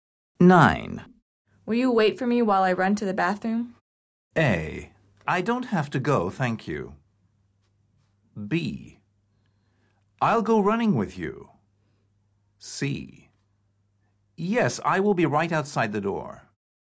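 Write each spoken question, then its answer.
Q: Will you wait for me while I run to the bathroom?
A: C: Yes, I will be right outside the door.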